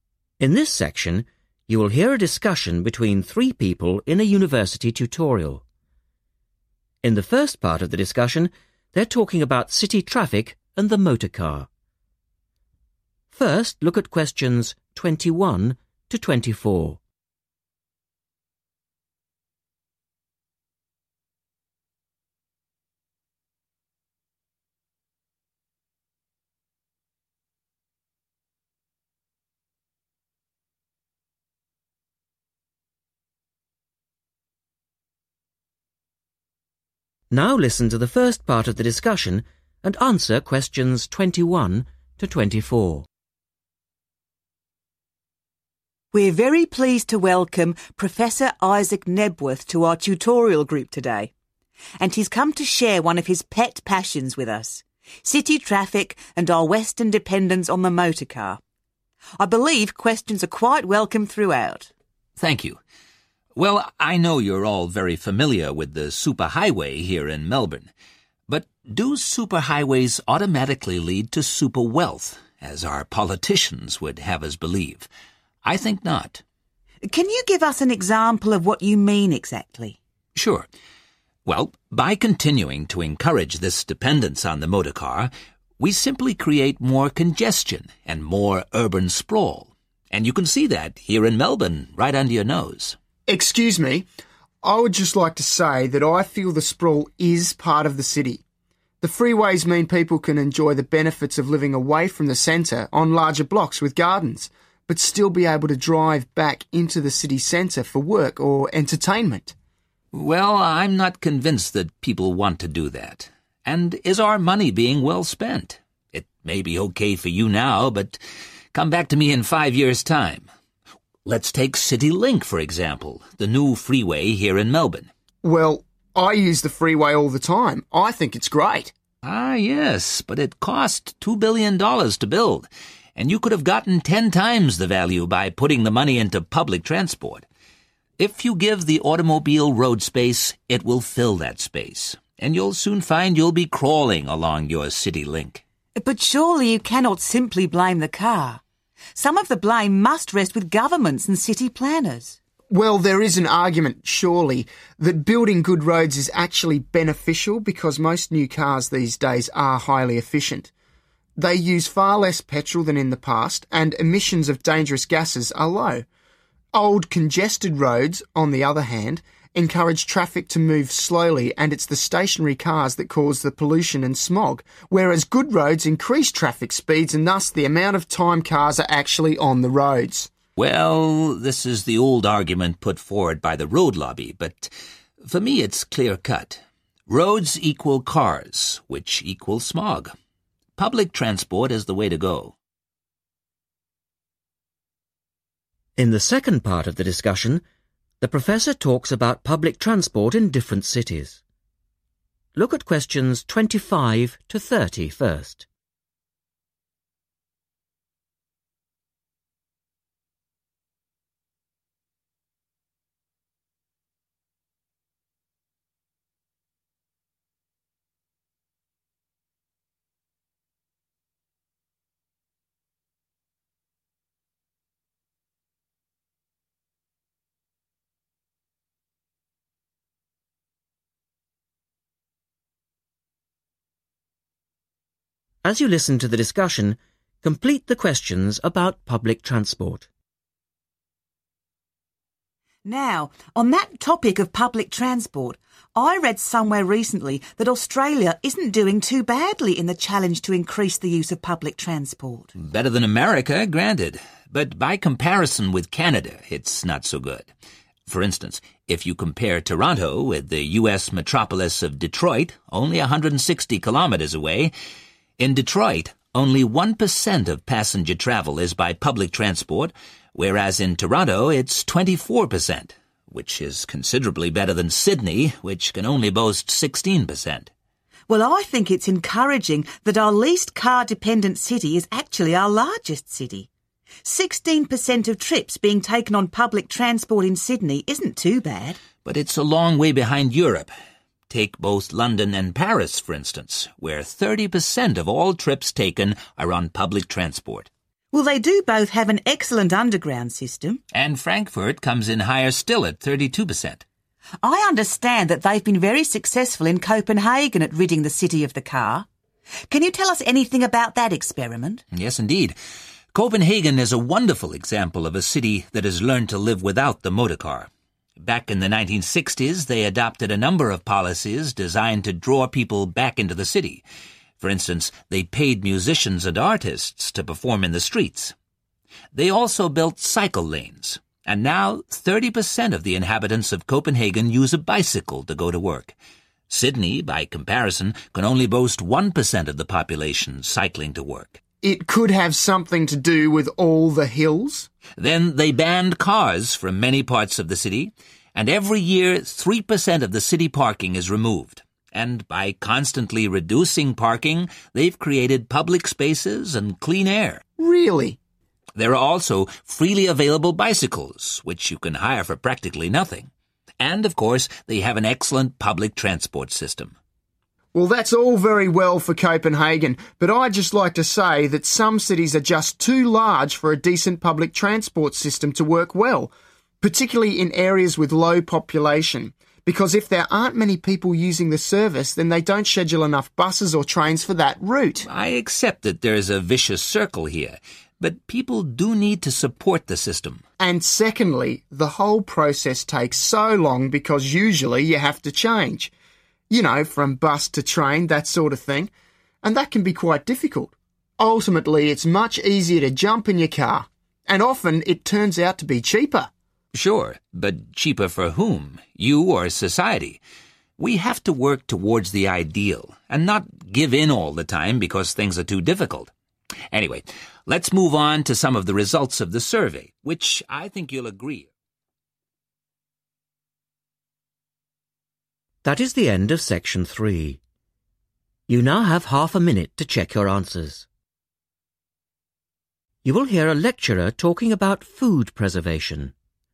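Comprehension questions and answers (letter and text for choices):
Choose the right answer A-C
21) The professor says that super highways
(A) lead to better lifestyles.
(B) are a feature of wealthy cities.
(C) result in more city suburbs.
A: (C) result in more city suburbs.

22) The student thinks people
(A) like the advantages of the suburbs.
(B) rarely go into the city for entertainment.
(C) enjoy living in the city.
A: (A) like the advantages of the suburbs.

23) The professor suggests that in five years' time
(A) City Link will be choked by traffic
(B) public transport will be more popular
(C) roads will cost ten times more to build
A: (A) City Link will be choked by traffic

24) The student believes that highways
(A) encourage a higher standard of driving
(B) result in lower levels of pollution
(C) discourage the use of old cars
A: (B) result in lower levels of pollution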